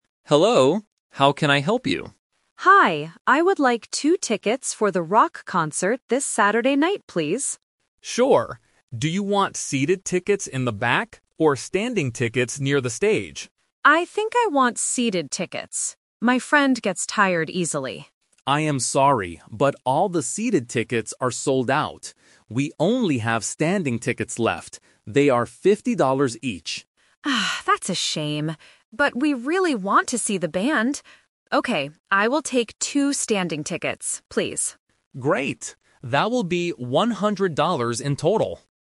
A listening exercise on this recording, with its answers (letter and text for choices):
Listen to the conversation between a customer and a ticket clerk. Choose the correct answer (A, B, or C) for each question.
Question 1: What kind of tickets did the customer want to buy at first?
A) Standing tickets near the stage.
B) VIP tickets.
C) Seated tickets in the back.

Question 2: Why does the customer buy the standing tickets?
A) Because the seated tickets are all sold out.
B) Because she wants to be close to the stage.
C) Because they are cheaper than seated tickets.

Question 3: How much money does the customer have to pay?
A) $50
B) $100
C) $150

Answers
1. C) Seated tickets in the back.
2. A) Because the seated tickets are all sold out.
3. B) $100

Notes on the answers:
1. The customer clearly states her first choice: "I think I want seated tickets. My friend gets tired easily." Option (A) is the A2 Twist/Trap because standing tickets are what she buys at the end, not what she wanted at first. Option (B) is a plausible ticket type but is never mentioned in the audio.
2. The clerk tells her, "I am sorry, but all the seated tickets are sold out." Because of this, she changes her mind and buys the standing ones. Option (B) is a trap; the standing tickets are near the stage, but that is not the reason she chose them (she just had no other choice). Option (C) is a logical guess in real life, but the price difference is not mentioned.
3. The customer buys two tickets, and the clerk confirms at the end: "That will be $100 in total." Option (A) is a math trap because $50 is the price for only one ticket ("They are $50 each"). Option (C) is an unmentioned distractor.

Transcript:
Clerk: Hello, how can I help you?
Customer: Hi, I would like two tickets for the rock concert this Saturday night, please.
Clerk: Sure. Do you want seated tickets in the back, or standing tickets near the stage?
Customer: I think I want seated tickets. My friend gets tired easily.
Clerk: I am sorry, but all the seated tickets are sold out. We only have standing tickets left. They are $50 each.
Customer: Oh, that's a shame. But we really want to see the band. Okay, I will take two standing tickets, please.